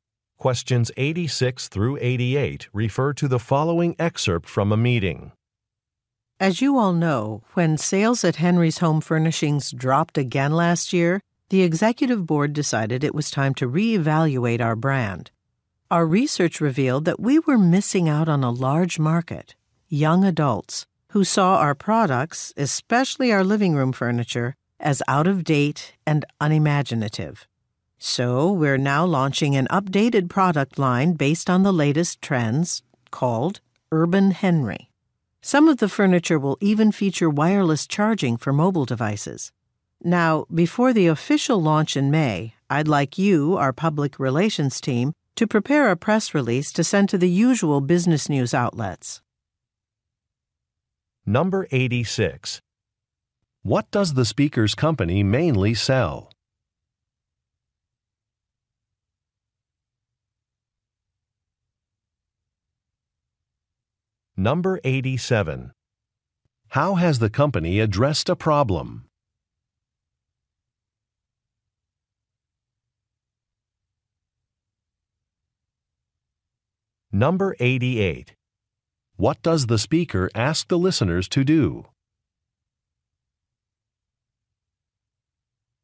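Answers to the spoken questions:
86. Furniture
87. By launching an updated product line
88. Prepare a press release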